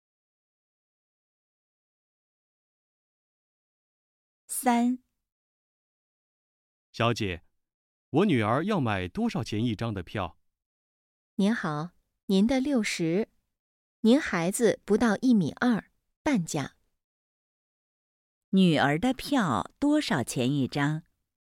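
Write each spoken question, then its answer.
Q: 女儿的票多少钱一张?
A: 30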